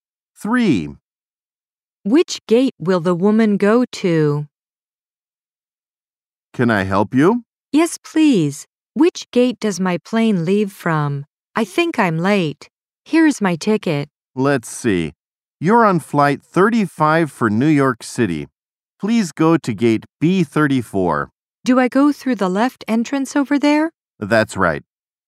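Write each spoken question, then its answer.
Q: Which gate will the woman go to?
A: Gate B34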